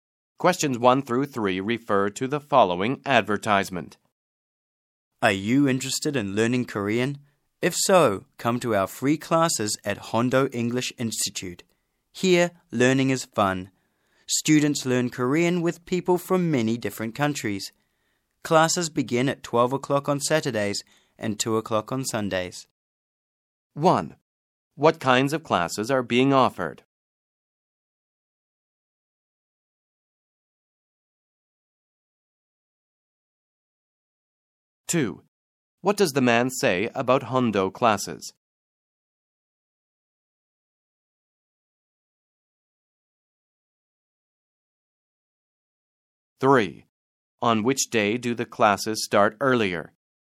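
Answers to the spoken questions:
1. Free Korean classes
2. Learning is fun; students learn with people from many countries
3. Saturday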